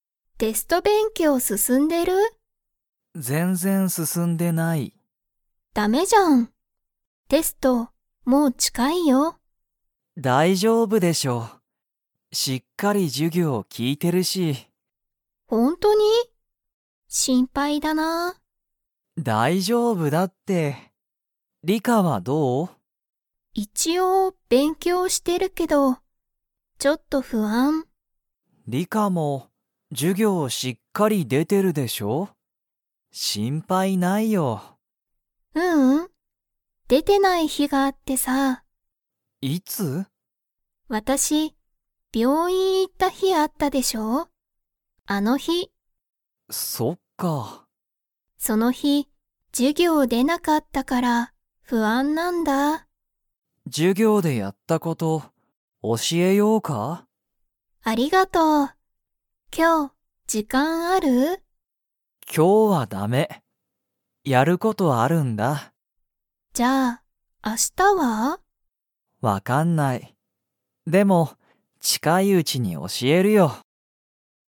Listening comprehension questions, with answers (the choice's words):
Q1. リカは、授業じゅぎょうに出でてない日ひ、 に行いった。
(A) 学校がっこう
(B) 駅えき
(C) 病院びょういん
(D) 仕事しごと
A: 病院びょういん

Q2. ナオキは、今日きょうリカに教おしえる時間じかんがありますか?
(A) はい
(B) いいえ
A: いいえ

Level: Level 3